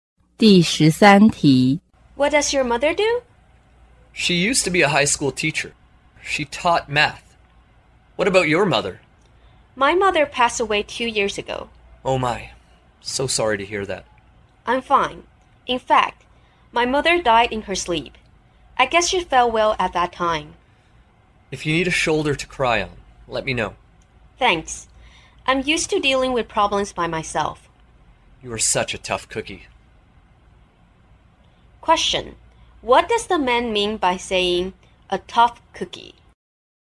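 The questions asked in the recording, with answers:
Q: What does the man mean by saying a tough cookie?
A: The woman is a strong person who handles difficulties by herself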